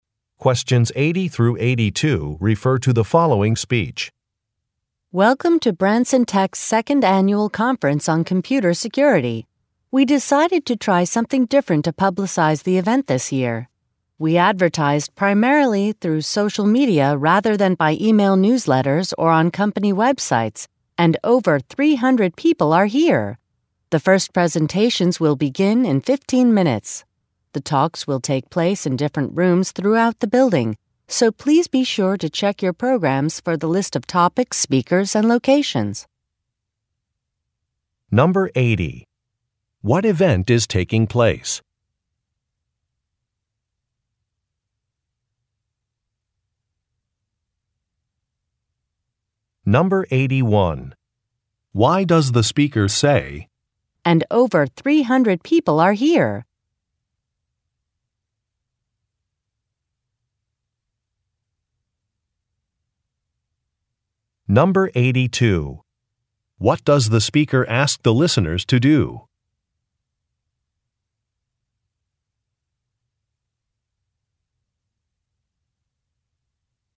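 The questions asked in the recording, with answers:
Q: What event is taking place?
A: A computer security conference

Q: Why does the speaker say, "And over 300 people are here"?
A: To show that advertising through social media was successful

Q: What does the speaker ask the listeners to do?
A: Check their programs for topics, speakers, and locations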